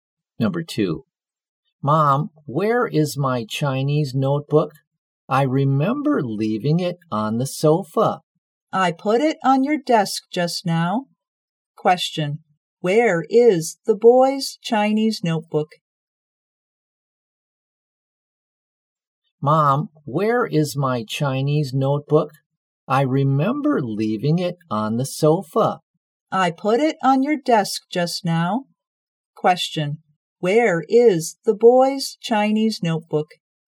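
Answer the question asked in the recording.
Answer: On his desk.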